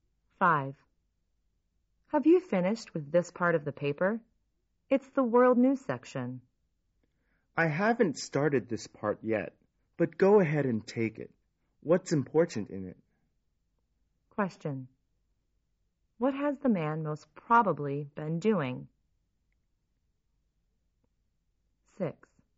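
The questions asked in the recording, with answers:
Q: What has the man most probably been doing?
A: Reading the newspaper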